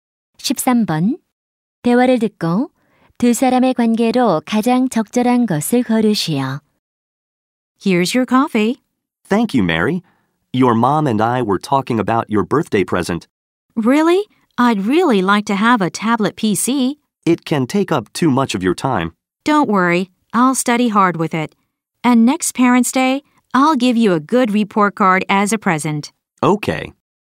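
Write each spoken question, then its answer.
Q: 대화를 듣고 두 사람의 관계로 가장 적절한 것을 고르시오.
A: 아버지와 딸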